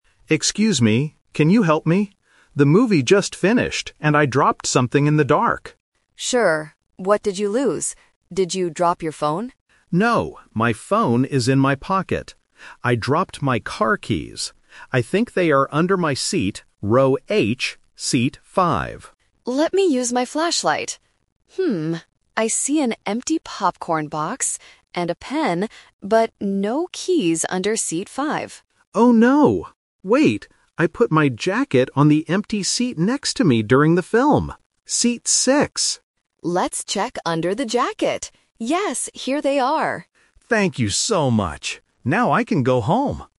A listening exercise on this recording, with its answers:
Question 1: What did the customer lose in the cinema?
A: His car keys

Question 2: What did the cleaner find under seat 5?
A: A pen

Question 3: Where did they finally find the lost item?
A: Under a jacket

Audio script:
Customer: Excuse me, can you help me? The movie just finished, and I dropped something in the dark.
Cleaner: Sure. What did you lose? Did you drop your phone?
Customer: No, my phone is in my pocket. I dropped my car keys. I think they are under my seat, row H, seat 5.
Cleaner: Let me use my flashlight. I see an empty popcorn box and a pen, but no keys under seat 5.
Customer: Oh no! Wait... I put my jacket on the empty seat next to me during the film. Seat 6.